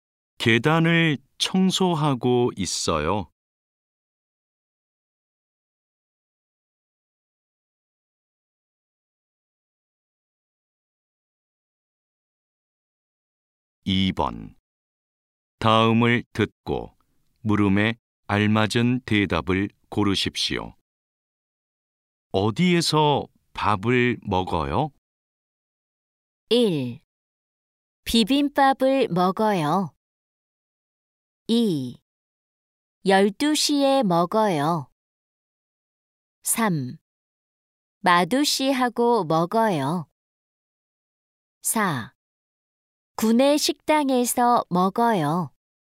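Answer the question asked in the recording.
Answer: 4: 구내 식당에서 먹어요.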